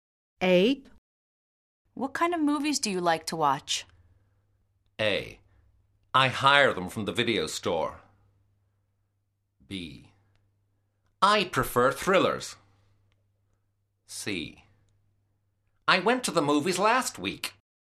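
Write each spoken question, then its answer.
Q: What kind of movies do you like to watch?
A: B: I prefer thrillers.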